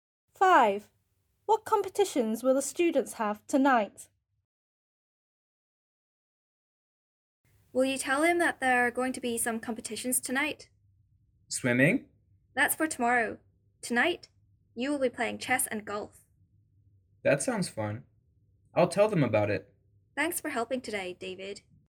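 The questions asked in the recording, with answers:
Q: What competitions will the students have tonight?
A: Chess and golf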